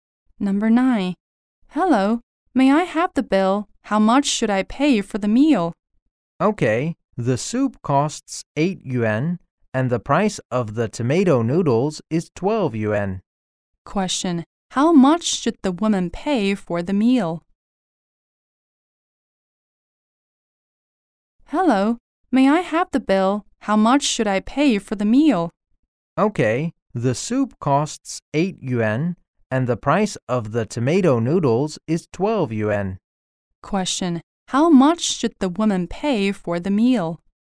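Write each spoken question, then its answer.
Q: how much should the woman pay for the meal?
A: 20 yuan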